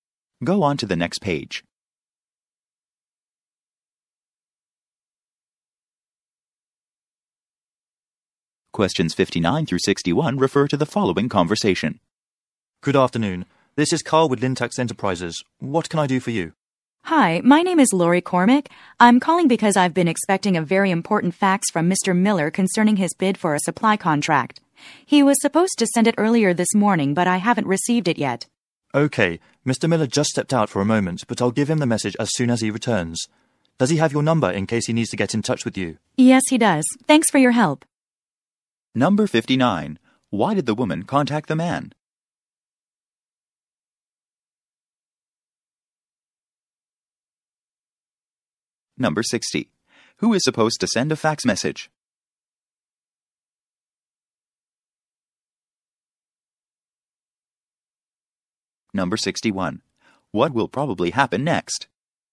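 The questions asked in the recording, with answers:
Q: Why did the woman contact the man?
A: She has not received an expected fax

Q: Who is supposed to send a fax message?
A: Mr. Miller

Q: What will probably happen next?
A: The man will give Mr. Miller the message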